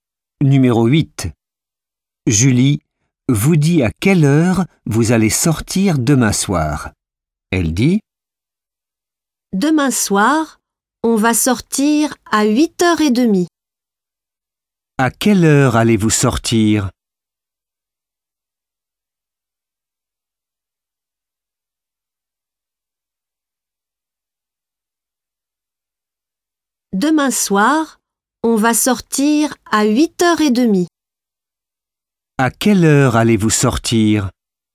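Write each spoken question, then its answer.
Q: À quelle heure allez-vous sortir ?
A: À 8h30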